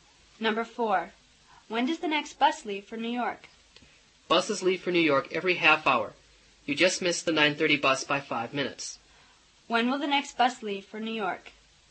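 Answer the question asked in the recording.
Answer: At 10:00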